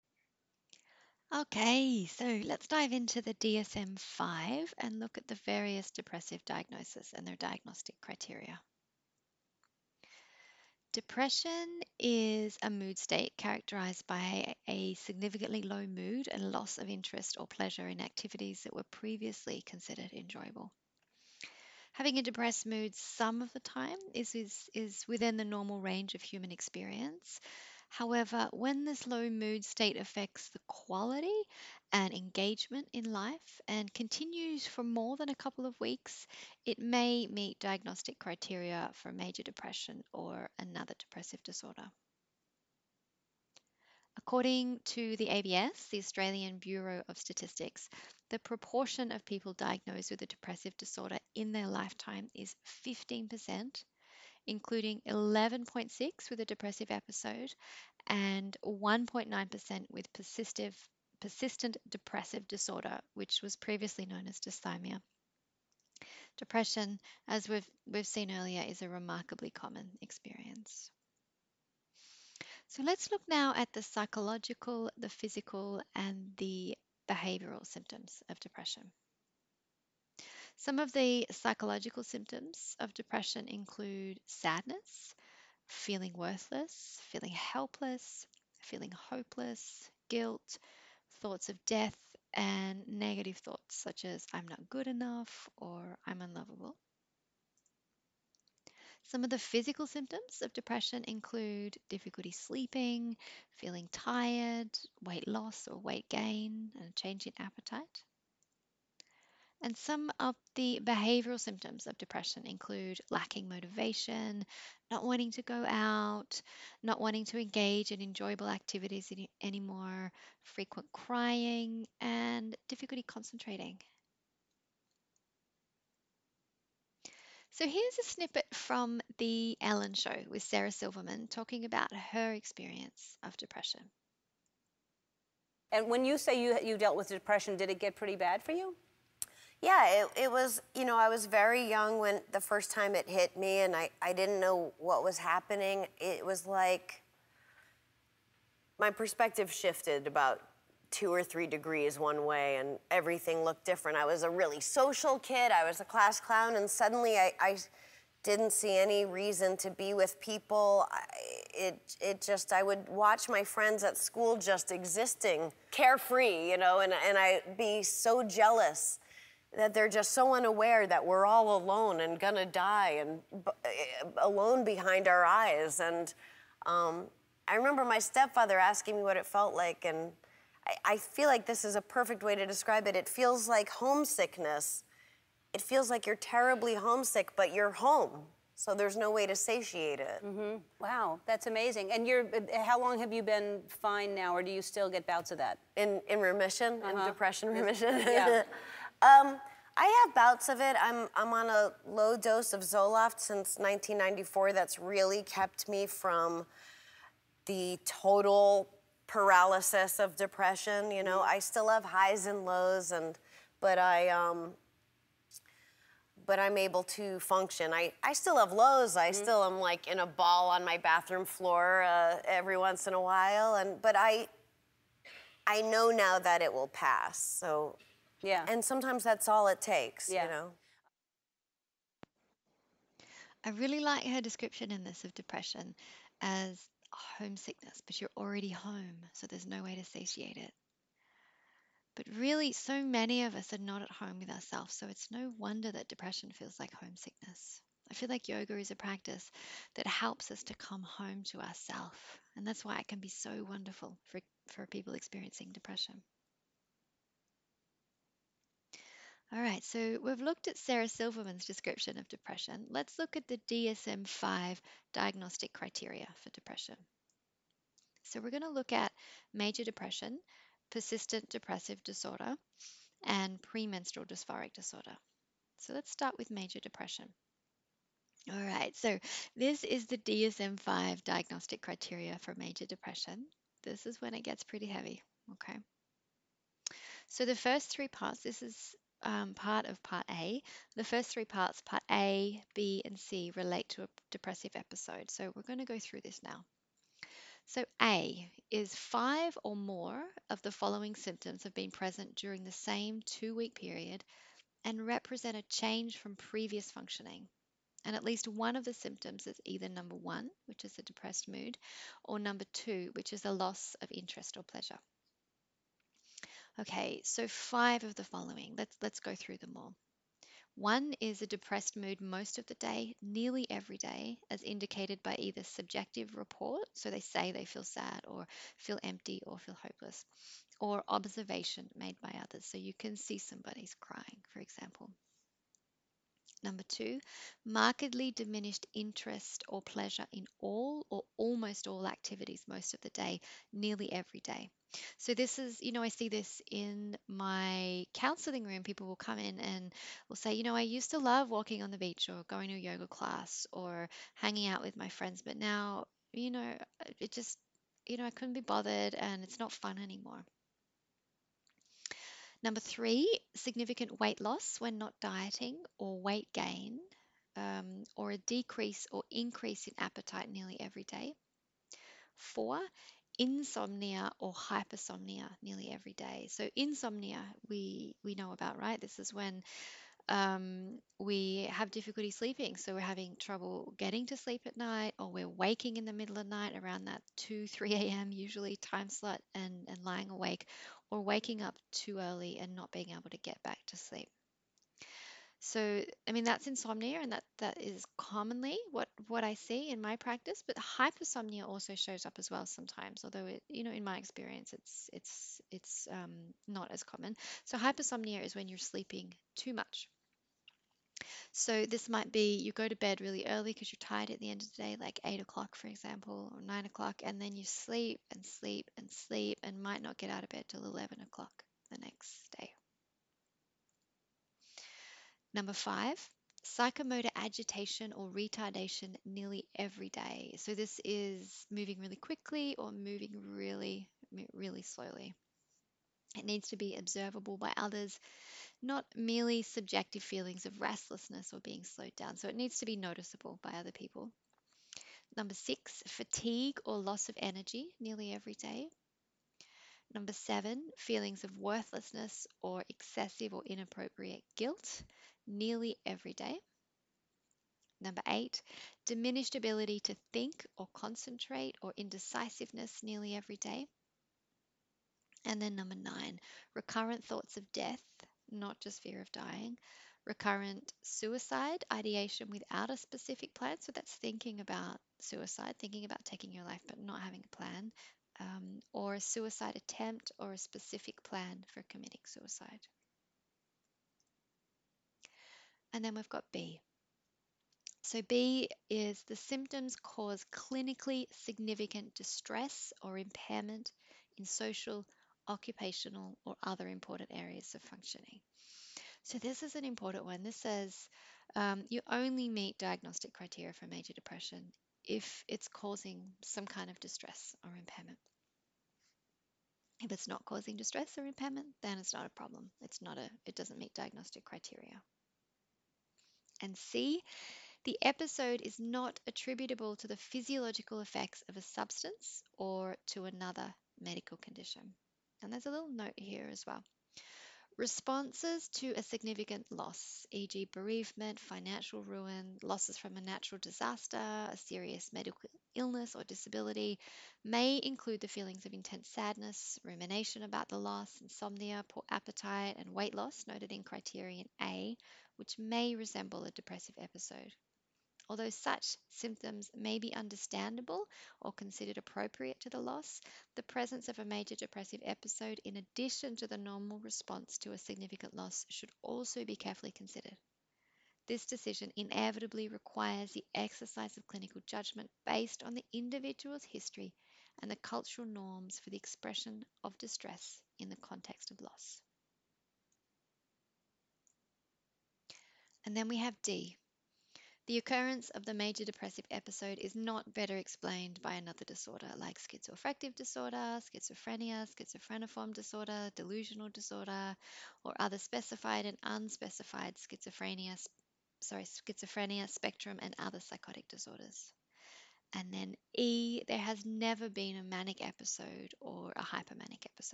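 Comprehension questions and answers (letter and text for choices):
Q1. What are some of the symptoms of Major Depression?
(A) Depressed mood most of the day, nearly every day.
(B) Decreased interest or pleasure in most activities.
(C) Fatigue or loss of energy.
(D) All of the above.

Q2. What are some of the psychological symptoms of depression?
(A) Hearing voices.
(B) Binge eating.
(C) Delusions of grandeur.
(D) None of the above.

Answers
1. (D) All of the above.
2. (D) None of the above.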